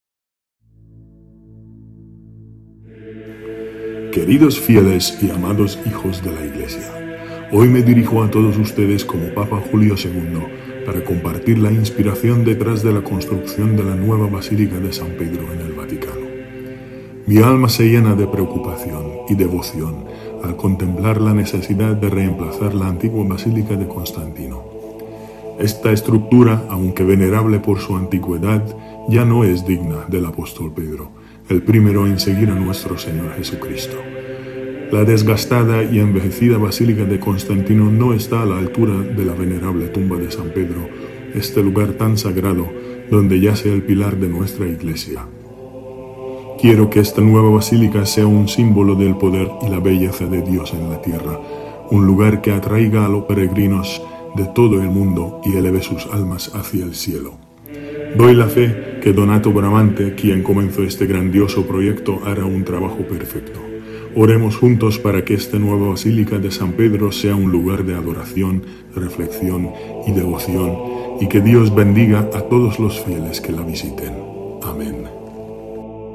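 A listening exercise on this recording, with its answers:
¿A ver cuánto sabes de la Basílica de San Pedro?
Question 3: ¿Cuál fue la razón principal que llevó al Papa Julio II a emprender la construcción de la nueva Basílica de San Pedro?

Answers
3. La antigua Basílica de Constantino estaba desgastada y no era digna de la tumba de San Pedro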